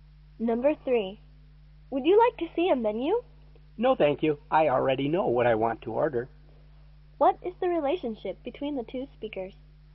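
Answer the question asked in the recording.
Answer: Waiter and customer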